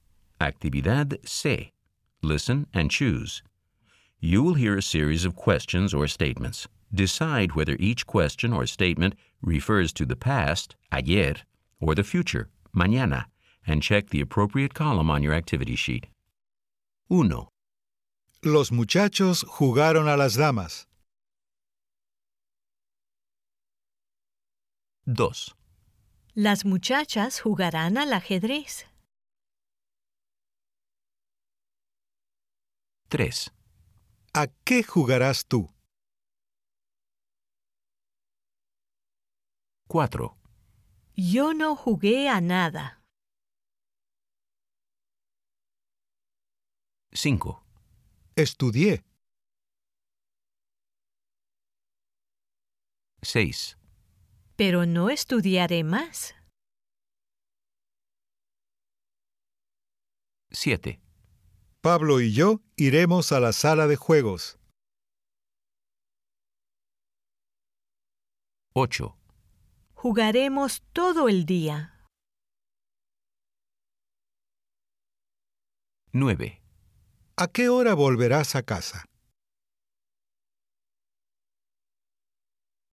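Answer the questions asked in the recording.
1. ayer (pasado)
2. mañana (futuro)
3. mañana (futuro)
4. ayer (pasado)
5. ayer (pasado)
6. mañana (futuro)
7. mañana (futuro)
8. mañana (futuro)
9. mañana (futuro)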